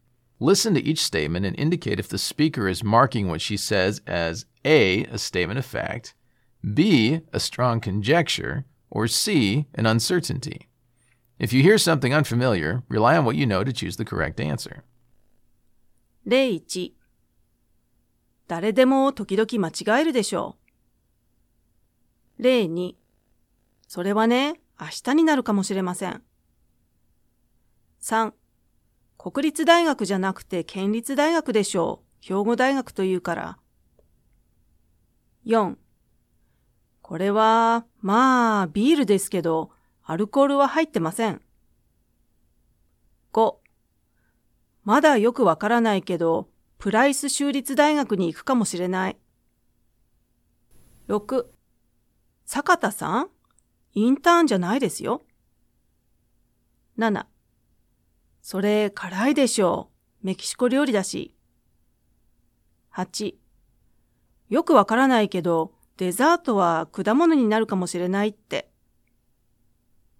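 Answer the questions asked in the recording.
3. B: a strong conjecture
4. A: a statement of fact
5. C: an uncertainty
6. A: a statement of fact
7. B: a strong conjecture
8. C: an uncertainty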